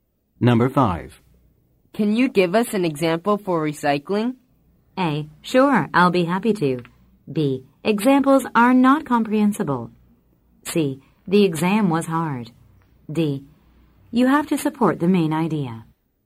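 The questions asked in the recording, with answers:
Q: Can you give us an example for recycling?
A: A: Sure, I'll be happy to.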